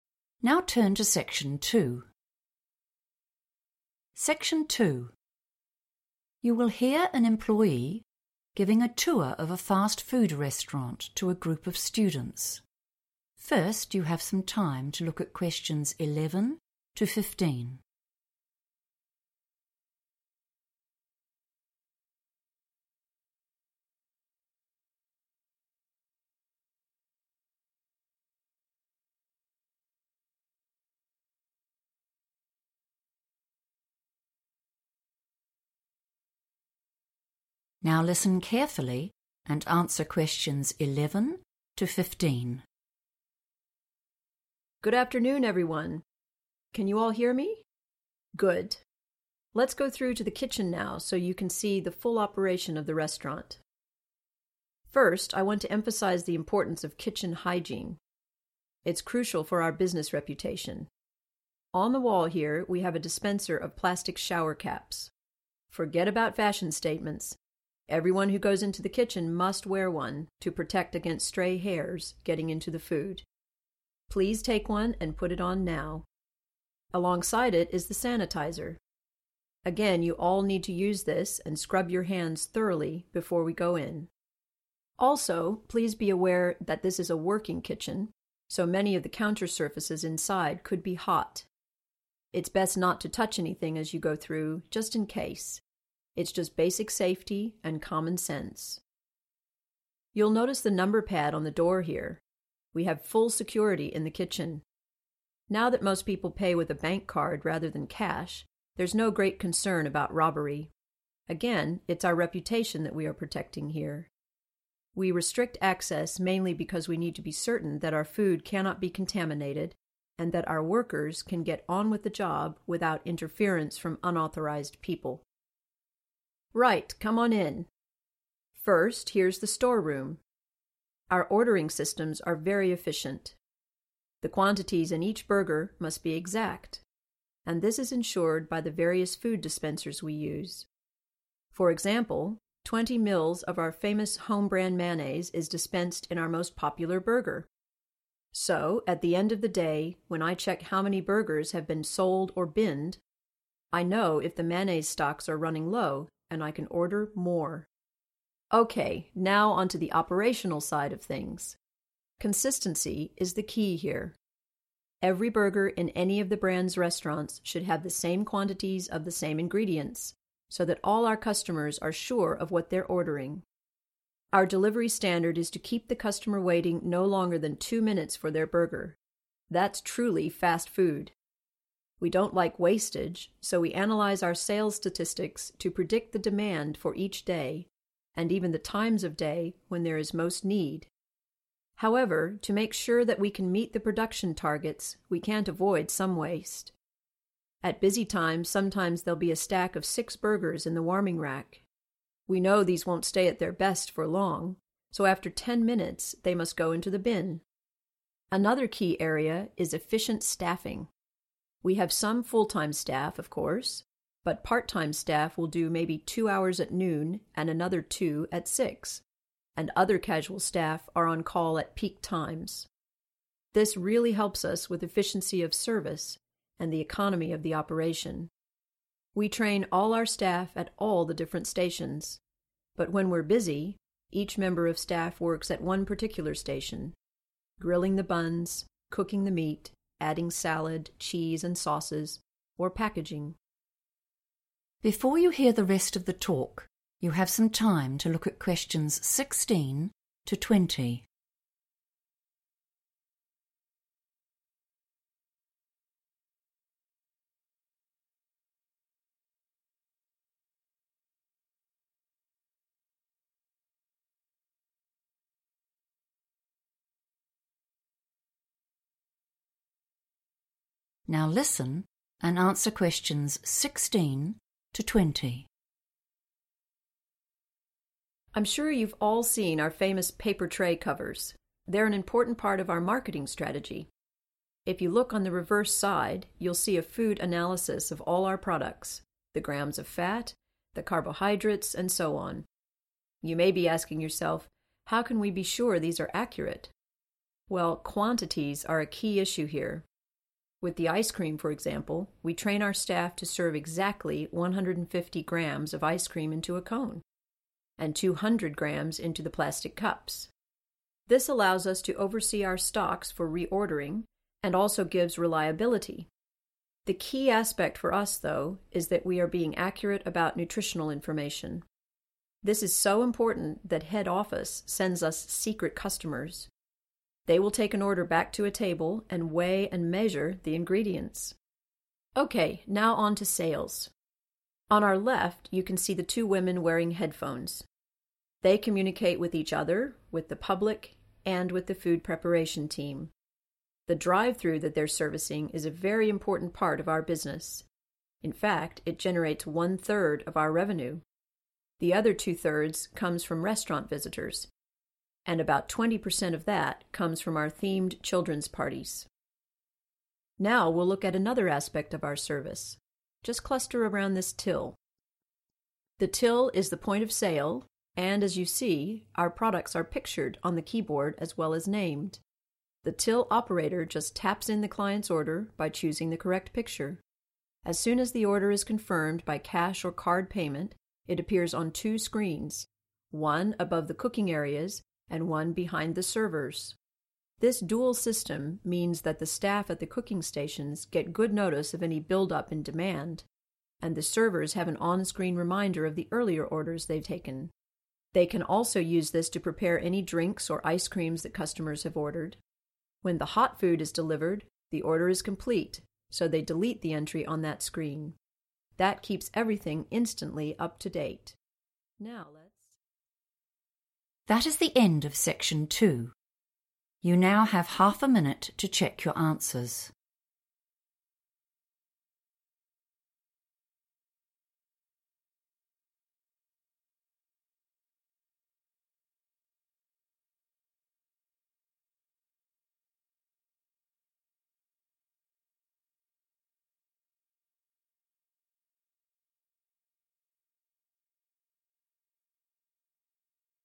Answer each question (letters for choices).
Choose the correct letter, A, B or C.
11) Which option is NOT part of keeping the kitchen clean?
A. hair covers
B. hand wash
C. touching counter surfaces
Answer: C

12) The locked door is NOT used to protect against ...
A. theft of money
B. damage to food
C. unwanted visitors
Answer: A

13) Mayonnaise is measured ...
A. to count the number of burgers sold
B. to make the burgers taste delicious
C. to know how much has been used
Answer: C

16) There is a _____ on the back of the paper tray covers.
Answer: food analysis

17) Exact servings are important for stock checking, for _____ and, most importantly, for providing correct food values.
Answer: reliability

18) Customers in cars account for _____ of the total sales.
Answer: a third / one third

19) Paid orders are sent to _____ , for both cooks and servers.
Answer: two screens / 2 screens

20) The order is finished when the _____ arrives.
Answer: hot food

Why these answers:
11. The transcript explains that kitchen hygiene (cleanliness) requires everyone to wear hair caps and scrub their hands with sanitiser. It also notes that not touching the counter surfaces is a rule for safety because they might be hot, not because of cleanliness. Answer Explanation: The answer means that touching the surfaces where food is prepared is not a rule for cleanliness; rather, it is a safety warning to prevent people from getting burned. Reason For Correctness: The correct answer is C because the speaker mentions shower caps (hair covers) and hand sanitiser (hand wash) as parts of 'kitchen hygiene' to keep the food clean. In contrast, the speaker warns people not to touch 'counter surfaces' because they could be 'hot,' which is described as 'basic safety' rather than a method for keeping the kitchen clean.
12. The transcript explains that since customers use cards, stealing cash is not a big problem. Instead, the kitchen is locked to keep the food clean and to make sure people who do not work there do not get in the way. Answer Explanation: The answer means that the primary reason for having a locked door on the kitchen is not to prevent people from stealing money. Reason For Correctness: The correct answer is A because the speaker explicitly states that stealing money (robbery) is not a major worry because most customers use bankcards instead of cash. The speaker clarifies that the real reasons for the locked door are to prevent food contamination and to stop people who are not supposed to be there from bothering the workers. Therefore, while the door protects against food damage and unwanted visitors, it is not primarily used to stop the theft of money.
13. The transcript explains that because each burger uses a set amount of mayonnaise (20 mls), the manager can look at the sales to figure out exactly how much has been used. This information helps them know if they are running out of sauce and need to buy more. Answer Explanation: The answer means that the mayonnaise is measured so the restaurant can track the amount they have used and know when they need to buy more supplies. Reason For Correctness: The correct answer is C because the speaker explains that a specific, exact amount of mayonnaise is put into each burger. By doing this, the manager can look at the number of burgers sold and calculate how much sauce has been consumed. This helps them monitor their "stocks" (the amount of food they have stored in the kitchen) and decide when to "order more" because they are "running low."
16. The transcript explains that the back part of the paper used to cover the food trays has a list showing details about the food, like how much fat and carbs it has. Answer Explanation: The answer is the information about what is inside the food, such as how much fat or sugar it contains. Reason For Correctness: The correct answer is 'food analysis' because the speaker specifically says that if you look at the back (the reverse side) of the paper tray covers, you will find a breakdown of the nutritional content of the products. Keywords like 'reverse side' and 'back' are synonyms in this context.
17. The transcript says that measuring food helps the restaurant manage their supplies and stay consistent. It also says that being truthful about food health facts is the most important part. Answer Explanation: The answer 'reliability' means that the restaurant provides the same service every time so that customers can trust what they receive. Reason For Correctness: The correct answer is 'reliability' because the speaker lists three reasons why they measure food exactly. First, it helps them know when to buy more supplies (oversee stocks). Second, it makes the service consistent (reliability). Third, it ensures the health information they give to customers is correct (nutritional information).
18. The transcript explains that the service provided to customers who stay in their cars (the drive-through) is a major part of the business, as it produces 1/3 of the total money they make. Answer Explanation: The answer means that people who buy food from their cars (the drive-through) make up 1/3 of the restaurant's total money earned. Reason For Correctness: The correct answer is 'one third' because the speaker mentions that the 'drive-through' service, which is for customers in cars, is responsible for one-third of the restaurant's total revenue (income or sales). Keywords like 'drive-through' refer to 'customers in cars', and 'revenue' refers to 'sales'.
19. The transcript explains that once someone pays for their food, the order is displayed on two computer screens. This helps both the people cooking and the people serving know exactly what they need to do for that specific customer. Answer Explanation: The answer means that when a customer pays, the order information shows up on two different electronic displays or monitors. Reason For Correctness: The correct answer is "two screens" because the text describes how the ordering system works after a customer pays. When a payment is "confirmed" (which means it is complete or paid), the order details are shown on "two screens." These screens are specifically for the staff who prepare the food ("above the cooking areas") and the staff who give the food to the customers ("behind the servers").
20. When the hot food is delivered, the order is complete, so they delete the entry on that screen Excerpt/Transcript Explanation: The transcript says that once the warm, cooked food is brought out, the order is finished. This allows the workers to remove the order from their computer list. Answer Explanation: The answer means food that has been cooked and is served warm, like burgers or fries. Reason For Correctness: The correct answer is 'hot food' because the speaker says that receiving this food marks the end of the process. In English, when something is 'complete', it means it is finished. The speaker explains that once this cooked food is brought to the counter, the staff can stop looking at that specific order on their screens.

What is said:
Good afternoon, everyone. Can you all hear me? Good. Let's go through to the kitchen now so you can see the full operation of the restaurant.
First, I want to emphasise the importance of kitchen hygiene. It's crucial for our business reputation. On the wall here we have a dispenser of plastic shower caps. Forget about fashion statements; everyone who goes into the kitchen must wear one, to protect against stray hairs getting into the food. Please take one and put it on now. Alongside it is the sanitiser – again, you all need to use this and scrub your hands thoroughly before we go in. Also, please be aware that this is a working kitchen, so many of the counter surfaces inside could be hot. It's best not to touch anything as you go through, just in case. It's just basic safety and common sense.
You'll notice the number pad on the door here. We have full security in the kitchen. Now that most people pay with a bankcard rather than cash, there's no great concern about robbery; again, it's our reputation that we are protecting here. We restrict access mainly because we need to be certain that our food cannot be contaminated, and that our workers can get on with the job without interference from unauthorised people.
Right, come on in. First, here's the storeroom. Our ordering systems are very efficient. The quantities in each burger must be exact, and this is ensured by the various food dispensers we use. For example, 20 mls of our famous home brand mayonnaise is dispensed in our most popular burger. So, at the end of the day, when I check how many burgers have been sold or binned, I know if the mayonnaise stocks are running low and I can order more.
OK, now on to the operational side of things. Consistency is the key here. Every burger in any of the brand's restaurants should have the same quantities of the same ingredients, so that all our customers are sure of what they're ordering. Our delivery standard is to keep the customer waiting no longer than two minutes for their burger – that's truly fast food! We don't like wastage, so we analyse our sales statistics to predict the demand for each day, and even the times of day when there is most need. However, to make sure that we can meet the production targets, we can't avoid some waste. At busy times sometimes there'll be a stack of six burgers in the warming rack. We know these won't stay at their best for long, so after ten minutes they must go into the bin. Another key area is efficient staffing. We have some full time staff, of course, but part-time staff will do maybe two hours at noon and another two at six and other casual staff are on call at peak times. This really helps us with efficiency of service and the economy of the operation. We train all our staff at all the different stations, but when we're busy, each member of staff works at one particular station; grilling the buns, cooking the meat, adding salad, cheese and sauces, or packaging.
I'm sure you've all seen our famous paper tray covers. They're an important part of our marketing strategy. If you look on the reverse side, you'll see a food analysis of all our products, the grams of fat, the carbohydrates and so on. You may be asking yourself, how can we be sure these are accurate? Well, quantities are a key issue here. With the ice cream, for example, we train our staff to serve exactly 150 grams of ice cream into a cone, and 200 grams into the plastic cups. This allows us to oversee our stocks for reordering, and also gives reliability. The key aspect for us, though, is that we are being accurate about nutritional information. This is so important that head office sends us secret customers. They will take an order back to a table and weigh and measure the ingredients!
OK, now on to sales. On our left you can see the two women wearing headphones. They communicate with each other, with the public, and with the food preparation team. The drive-through that they're servicing is a very important part of our business; in fact, it generates one third of our revenue. The other two thirds comes from restaurant visitors, and about 20 per cent of that comes from our themed children's parties.
Now we'll look at another aspect of our service – just cluster around this till. The till is the point of sale and, as you see, our products are pictured on the keyboard as well as named. The till operator just taps in the client's order by choosing the correct picture. As soon as the order is confirmed by cash or card payment, it appears on two screens; one above the cooking areas and one behind the servers. This dual system means that the staff at the cooking stations get good notice of any build-up in demand, and the servers have an onscreen reminder of the earlier orders they've taken. They can also use this to prepare any drinks or ice-creams that customers have ordered. When the hot food is delivered, the order is complete, so they delete the entry on that screen. That keeps everything instantly up-to-date. Now...